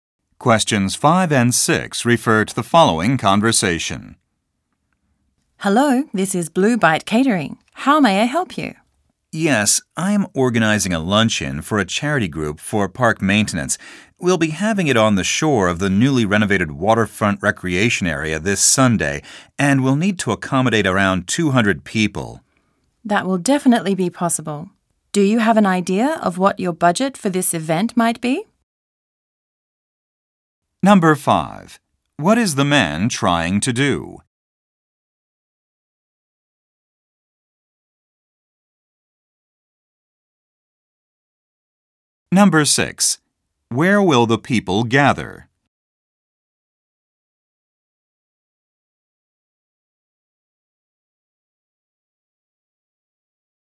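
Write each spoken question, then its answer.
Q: What is the man trying to do?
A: Arrange catering for a charity luncheon

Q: Where will the people gather?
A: At the newly renovated waterfront recreation area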